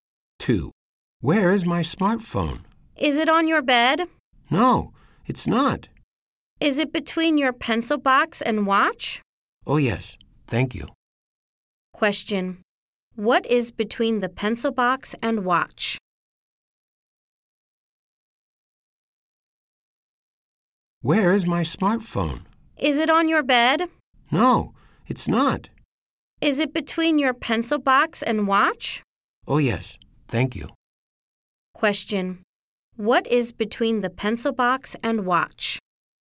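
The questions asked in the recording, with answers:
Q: What is between the pencil box and watch?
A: The smartphone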